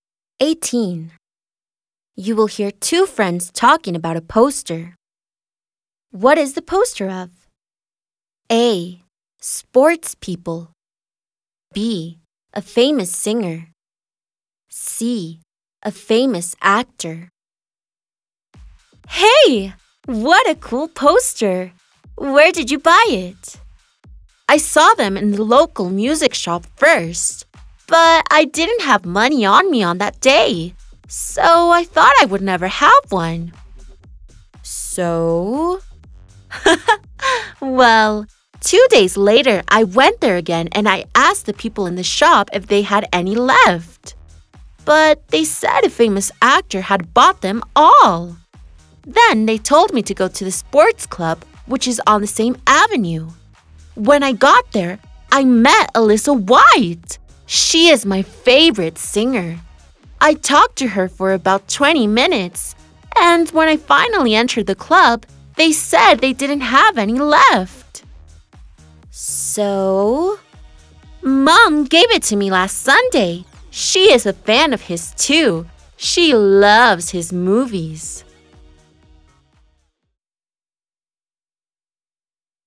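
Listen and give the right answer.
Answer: C: A famous actor.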